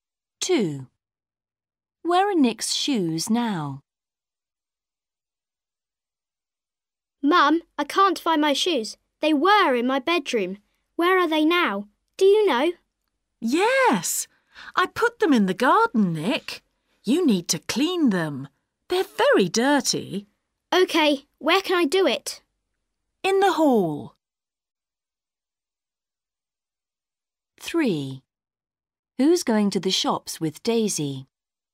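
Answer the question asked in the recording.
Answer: In the garden.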